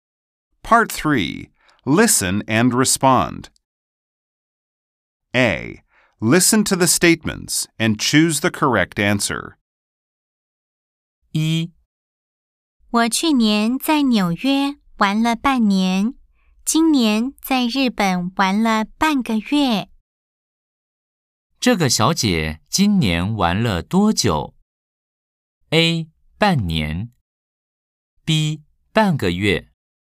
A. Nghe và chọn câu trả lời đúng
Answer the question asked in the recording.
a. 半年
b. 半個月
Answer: b. 半個月

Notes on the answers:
我去年在紐約玩了半年。